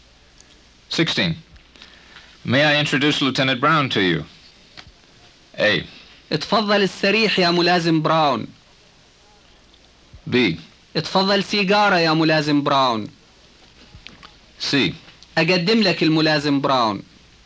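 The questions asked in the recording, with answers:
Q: May I introduce Lieutenant Brown to you?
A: C: اقدم لك الملازم براون.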